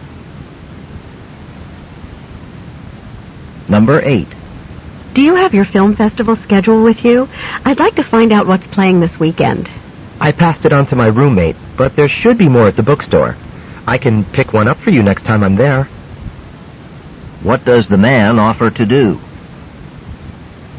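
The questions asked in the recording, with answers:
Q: What does the man offer to do?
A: Pick up a festival schedule for her at the bookstore.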